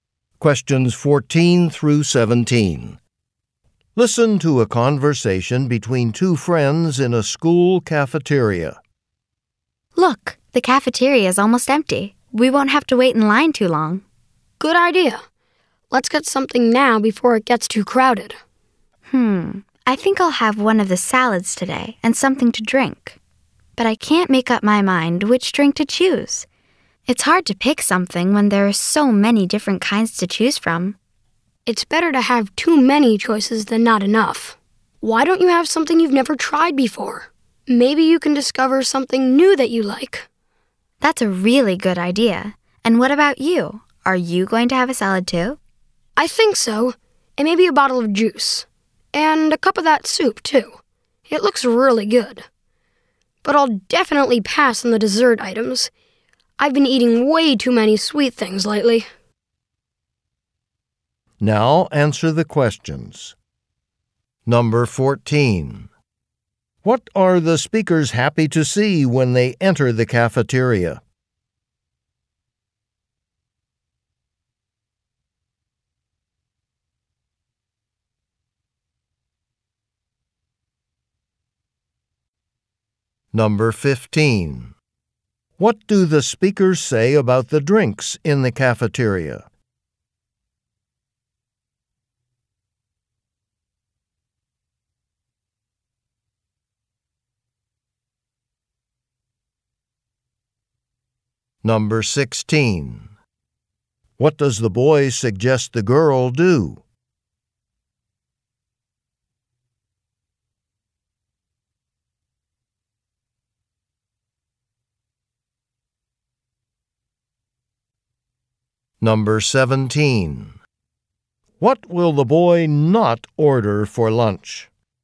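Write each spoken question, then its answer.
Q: What are the speakers happy to see when they enter the cafeteria?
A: The cafeteria is almost empty

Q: What do the speakers say about the drinks in the cafeteria?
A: There are many different kinds to choose from

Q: What does the boy suggest the girl do?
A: Try a drink she has never tried before

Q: What will the boy not order for lunch?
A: Dessert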